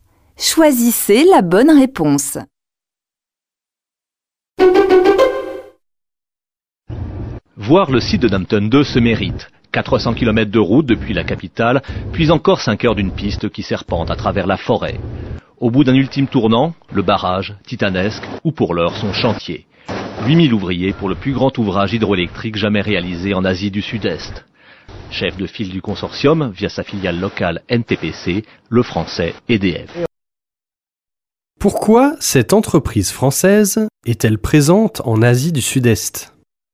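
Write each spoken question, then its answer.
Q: Pourquoi cette entreprise française est-elle présente en Asie du Sud-Est ?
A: Elle dirige le consortium qui construit un grand barrage hydroélectrique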